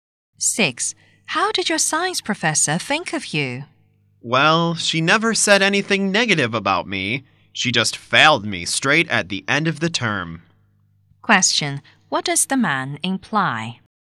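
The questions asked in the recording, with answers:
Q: Question, what does the man imply?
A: He failed the science course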